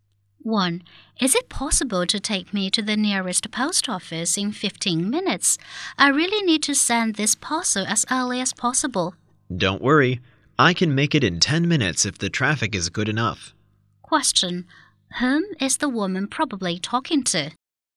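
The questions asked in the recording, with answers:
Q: Whom is the woman probably talking to?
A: A taxi driver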